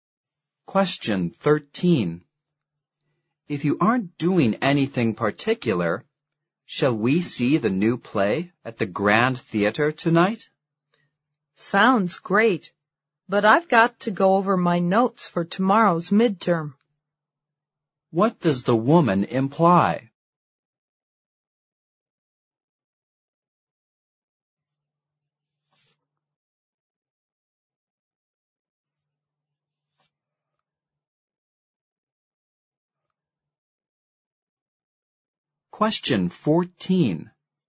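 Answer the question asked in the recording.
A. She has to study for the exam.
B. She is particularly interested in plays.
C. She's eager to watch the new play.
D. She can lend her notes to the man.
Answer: A. She has to study for the exam.

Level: 四级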